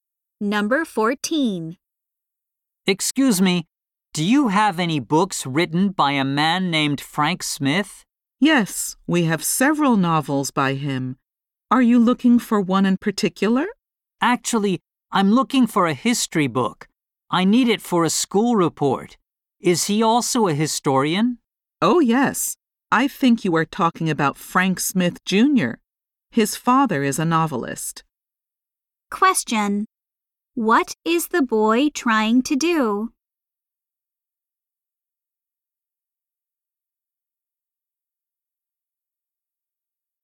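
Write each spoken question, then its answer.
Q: What is the boy trying to do?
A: Find a history book by Frank Smith for a school report.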